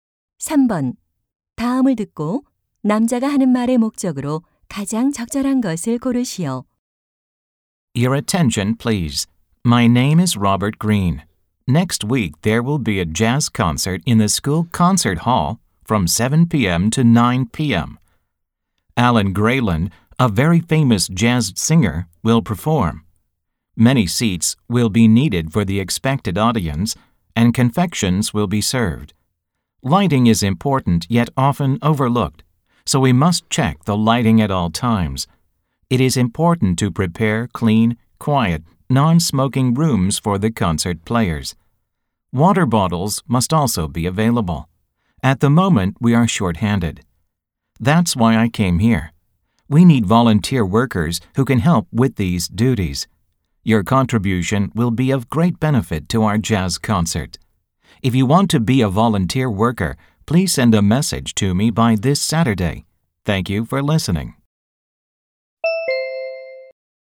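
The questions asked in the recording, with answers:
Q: 다음을 듣고 남자가 하는 말의 목적으로 가장 적절한 것을 고르시오.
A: 재즈 콘서트 자원봉사자를 모집하려고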